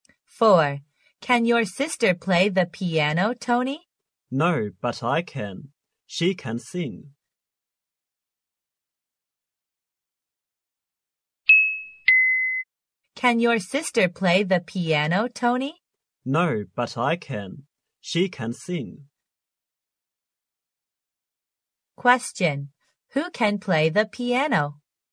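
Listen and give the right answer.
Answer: Tony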